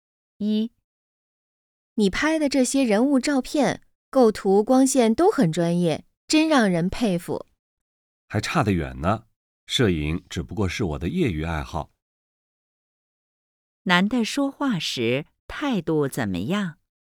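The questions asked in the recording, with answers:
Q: 男的说话时态度怎么样?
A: 谦虚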